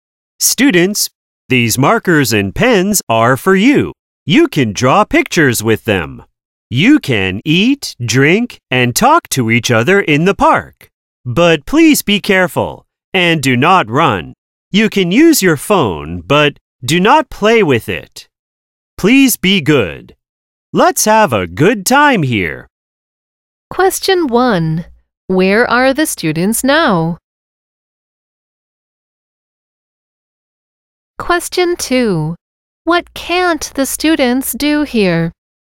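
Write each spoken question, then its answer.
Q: Where are the students now?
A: In the park

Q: What can't the students do here?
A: Run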